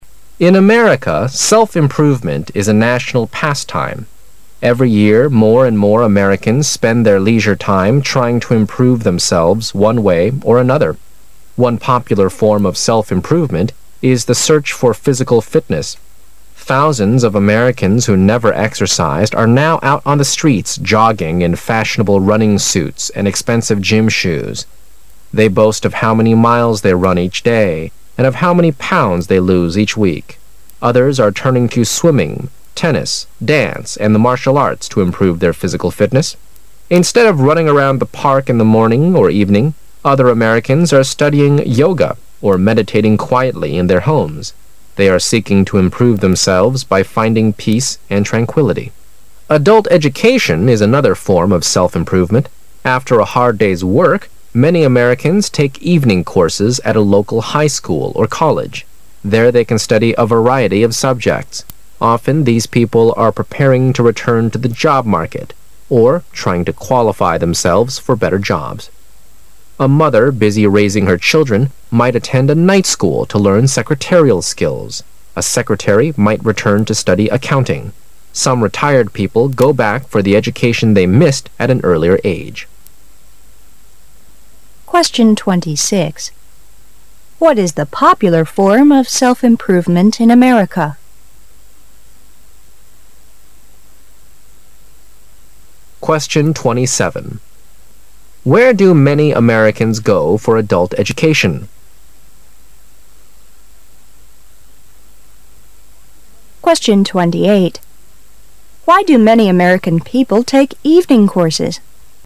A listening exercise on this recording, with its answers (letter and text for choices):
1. Where do many Americans go for adult education?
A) On the job market.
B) At their former schools.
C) In their homes.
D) At the local high schools or colleges.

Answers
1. D) At the local high schools or colleges.

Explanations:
事实细节题。短文最后一段指出"After a hard day's work,... at a local high school or college. There they can study variety of subjects"(一天的辛苦工作后,许多美国人参加当地中学或大学举办的夜校。在那儿,他们能够学到各种课程。)由此可知,D)项正确。

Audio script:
Every year, more and more Americans spend their leisure time trying to improve themselves one way or another. One popular form of self-improvement is the search for physical fitness. Thousands of Americans who never exercised are now out an the streets jogging in fashionable running suits and expensive gym shoes. They boast of how many miles they run each day and of how many pounds they lose each week. Others are turning to swimming, tennis, dance, and the martial arts to improve their physical fitness. Instead of running around the park in the morning or evening, other Americans are studying yoga or meditating quietly in their homes. They are seeking to improve themselves by finding peace and tranquility. Adult education is another form of self-improvement. After a hard day's work, many Americans take evening courses at a local high school or college. There they can study variety of subjects. Often these people are preparing to return to the job market or trying to qualify themselves for better jobs. A mother busy raising her children might attend a night school to learn secretarial skills. A secretary might return to study accounting. Some retired people go back for the education they missed at an earlier age. What is the popular form of self-improvement in America?